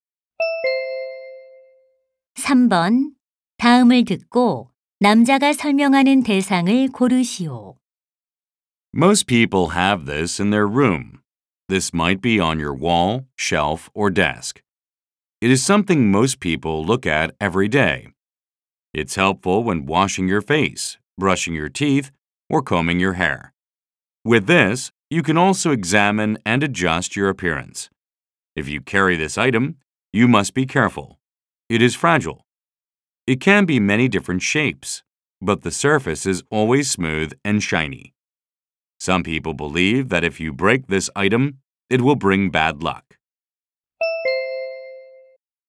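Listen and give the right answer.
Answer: 거울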